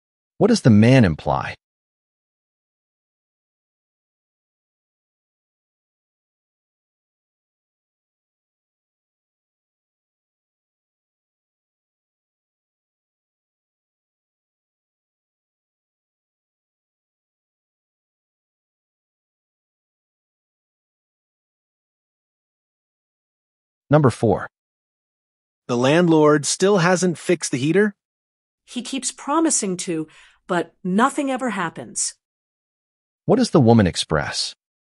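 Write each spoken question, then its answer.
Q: What does the woman express?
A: Frustration that the landlord never keeps his promise to fix the heater.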